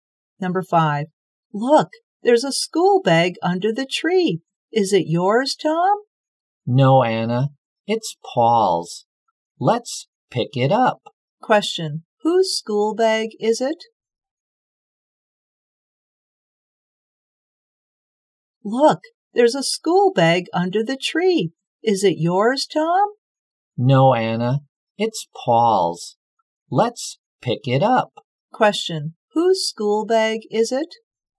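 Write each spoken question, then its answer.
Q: Whose school bag is it?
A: Paul's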